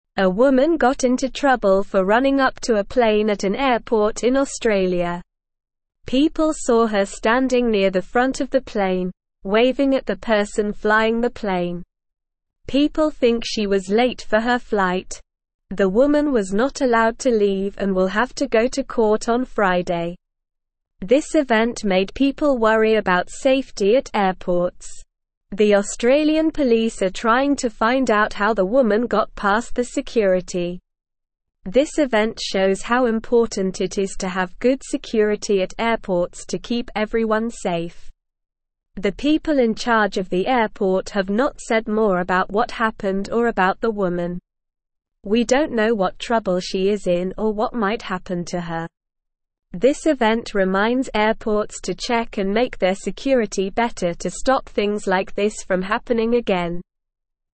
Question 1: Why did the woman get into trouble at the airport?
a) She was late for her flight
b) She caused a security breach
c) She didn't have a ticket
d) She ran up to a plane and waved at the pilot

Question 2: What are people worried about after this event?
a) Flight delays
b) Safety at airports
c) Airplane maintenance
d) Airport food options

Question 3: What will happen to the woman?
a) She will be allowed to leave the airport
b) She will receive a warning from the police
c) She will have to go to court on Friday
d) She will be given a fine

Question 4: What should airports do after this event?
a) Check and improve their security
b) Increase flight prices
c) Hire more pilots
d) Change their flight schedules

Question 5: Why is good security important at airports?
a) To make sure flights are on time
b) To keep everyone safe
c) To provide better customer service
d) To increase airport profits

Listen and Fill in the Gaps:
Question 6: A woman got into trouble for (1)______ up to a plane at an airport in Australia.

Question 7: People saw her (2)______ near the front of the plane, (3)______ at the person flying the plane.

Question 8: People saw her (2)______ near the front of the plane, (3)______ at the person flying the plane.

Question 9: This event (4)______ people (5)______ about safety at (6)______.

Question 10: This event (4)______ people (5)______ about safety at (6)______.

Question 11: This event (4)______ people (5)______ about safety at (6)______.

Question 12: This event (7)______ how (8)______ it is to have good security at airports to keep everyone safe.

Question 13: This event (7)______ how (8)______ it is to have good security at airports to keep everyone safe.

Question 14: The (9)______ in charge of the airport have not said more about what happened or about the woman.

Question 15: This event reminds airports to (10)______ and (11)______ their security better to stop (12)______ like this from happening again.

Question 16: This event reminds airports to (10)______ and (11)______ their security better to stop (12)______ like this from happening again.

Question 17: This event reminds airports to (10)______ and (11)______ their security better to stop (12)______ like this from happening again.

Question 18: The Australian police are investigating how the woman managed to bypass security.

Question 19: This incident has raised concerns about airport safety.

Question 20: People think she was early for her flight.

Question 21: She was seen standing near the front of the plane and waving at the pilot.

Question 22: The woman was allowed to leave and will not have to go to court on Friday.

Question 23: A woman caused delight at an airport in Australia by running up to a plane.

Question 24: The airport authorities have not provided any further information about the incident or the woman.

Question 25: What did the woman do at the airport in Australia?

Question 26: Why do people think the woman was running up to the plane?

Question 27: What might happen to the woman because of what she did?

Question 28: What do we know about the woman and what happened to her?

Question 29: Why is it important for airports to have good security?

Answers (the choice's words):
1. She ran up to a plane and waved at the pilot
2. Safety at airports
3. She will have to go to court on Friday
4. Check and improve their security
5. To keep everyone safe
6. running
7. standing
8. waving
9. made
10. worry
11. airports
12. shows
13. important
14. people
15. check
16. make
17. things
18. True
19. True
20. False
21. True
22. False
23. False
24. True
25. The woman ran up to a plane at the airport in Australia.
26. People think she was running up to the plane because she was late for her flight.
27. The woman might have to go to court because of what she did.
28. We don't know much about the woman or what happened to her.
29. It is important for airports to have good security to keep everyone safe.

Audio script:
A woman got into trouble for running up to a plane at an airport in Australia. People saw her standing near the front of the plane, waving at the person flying the plane. People think she was late for her flight. The woman was not allowed to leave and will have to go to court on Friday.
This event made people worry about safety at airports. The Australian police are trying to find out how the woman got past the security. This event shows how important it is to have good security at airports to keep everyone safe.
The people in charge of the airport have not said more about what happened or about the woman. We don't know what trouble she is in or what might happen to her. This event reminds airports to check and make their security better to stop things like this from happening again.

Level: Level 2